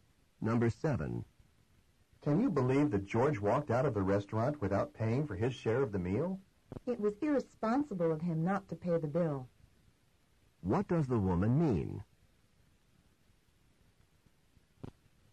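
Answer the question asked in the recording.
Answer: George acted irresponsibly by not paying.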